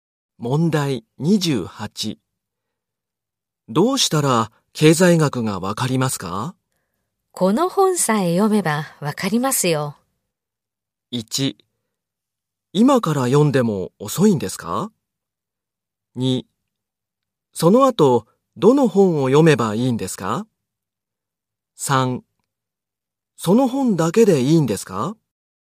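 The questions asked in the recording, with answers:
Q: どうしたら経済学がわかりますか?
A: 3: その本だけでいいんですか?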